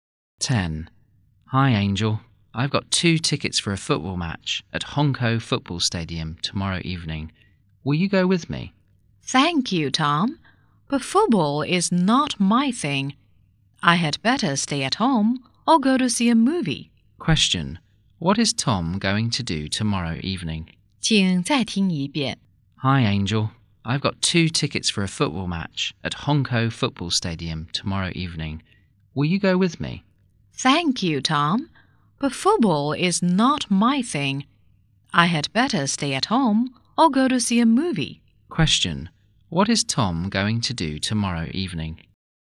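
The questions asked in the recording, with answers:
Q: What is Tom going to do tomorrow evening?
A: Go to a football match at Hongkou Football Stadium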